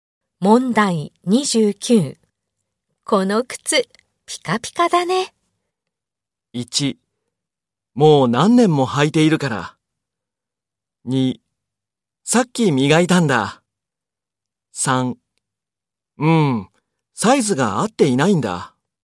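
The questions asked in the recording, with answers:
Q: この靴、ピカピカだね。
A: 2: さっき磨いたんだ。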